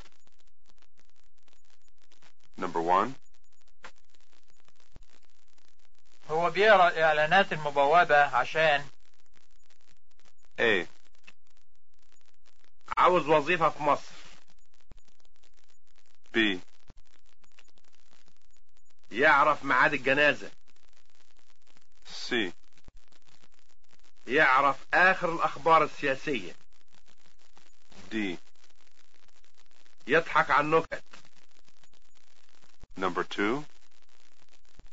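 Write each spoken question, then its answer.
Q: هو بيقرا الاعلانات المبوبه عشان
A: A: عاوز وظيفه في مصر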